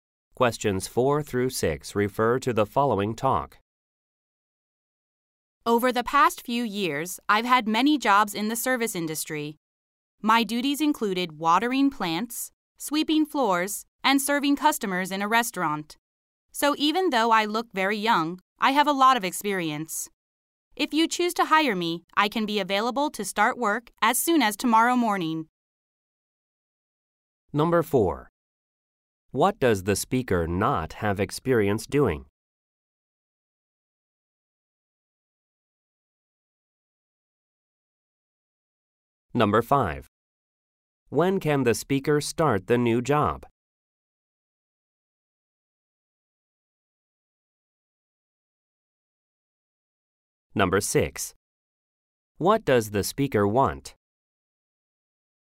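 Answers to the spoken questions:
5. Tomorrow morning
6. To be hired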